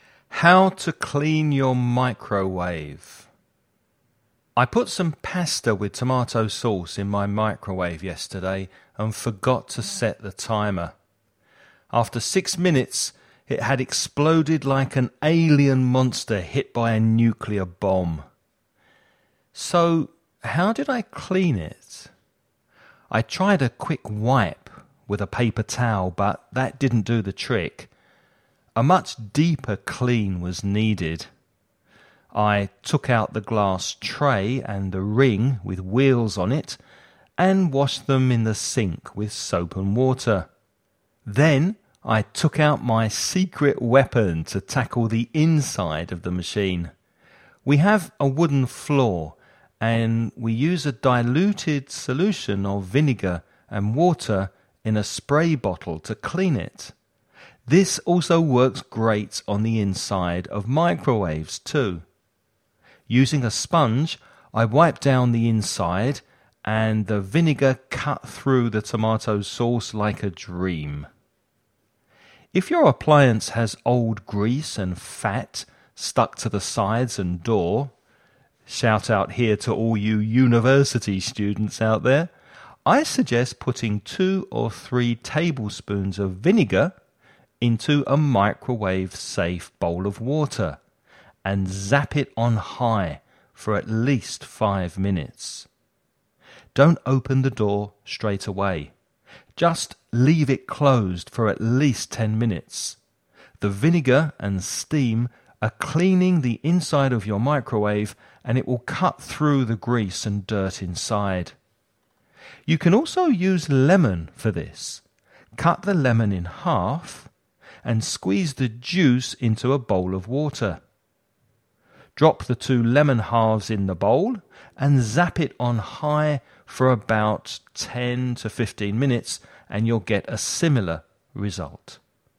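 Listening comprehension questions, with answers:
Listen and write the questions you hear.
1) What did the man heat up that made such a mess of his microwave?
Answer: pasta with tomato sauce

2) What dos the man describe as his 'secret weapon'?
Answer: a diluted solution of vinegar and water

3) How much vinegar should you dilute in a bowl of water?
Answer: 2 or 3 tablespoons

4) How much time should the bowl of water and vinegar be heated in the microwave?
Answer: at least 5 minutes

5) What could you put in the water if you don't have any vinegar?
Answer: lemon

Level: nivel intermedio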